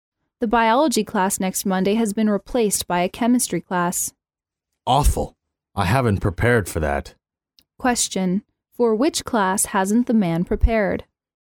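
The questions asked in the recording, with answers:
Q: For which class hasn't the man prepared?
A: The chemistry class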